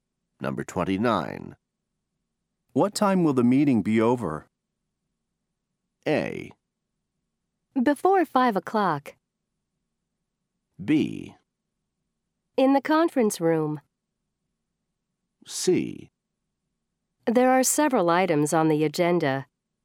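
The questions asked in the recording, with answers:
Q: What time will the meeting be over?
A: A: Before 5 o'clock.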